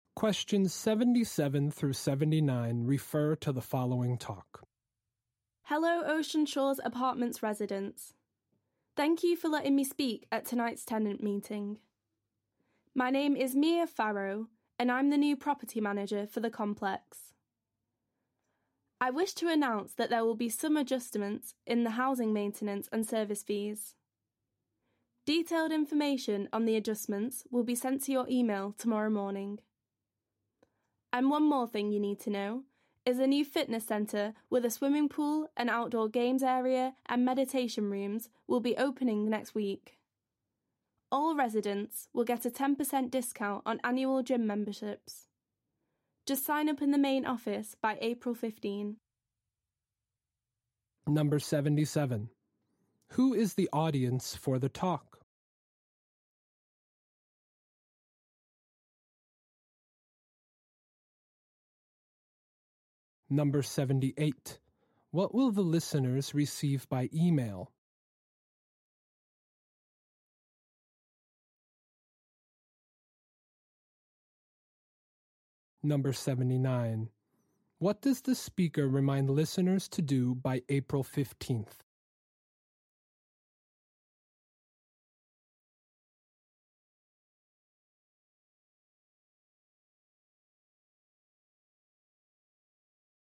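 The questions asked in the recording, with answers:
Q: Who is the audience for the talk?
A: Apartment residents (tenants)

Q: What will the listeners receive by email?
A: Detailed information on the fee adjustments

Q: What does the speaker remind listeners to do by April 15th?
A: Sign up for a discounted gym membership in the main office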